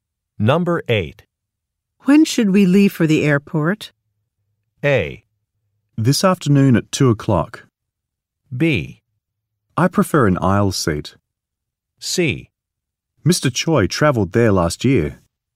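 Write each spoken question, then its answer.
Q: When should we leave for the airport?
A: A: This afternoon at 2 o'clock.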